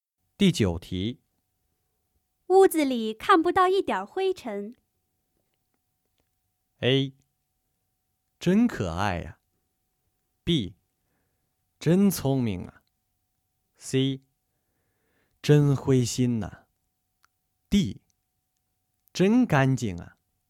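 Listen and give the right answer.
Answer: D: 真干净啊。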